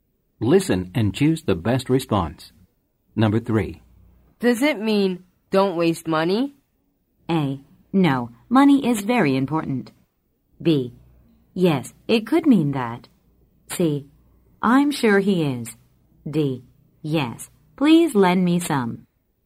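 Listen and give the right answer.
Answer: B: Yes, it could mean that.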